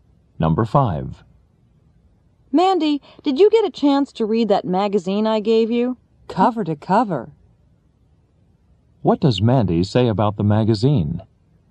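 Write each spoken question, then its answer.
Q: What does Mandy say about the magazine?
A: She read all of it.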